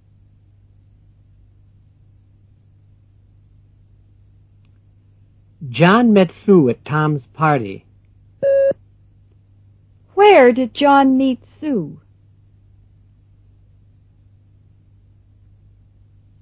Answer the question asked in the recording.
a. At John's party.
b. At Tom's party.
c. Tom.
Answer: b. At Tom's party.

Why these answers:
John met Sue at Tom's party. Where did John meet Sue?

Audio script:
4.John met Sue at Tom's party. Where did John meet Sue? (b)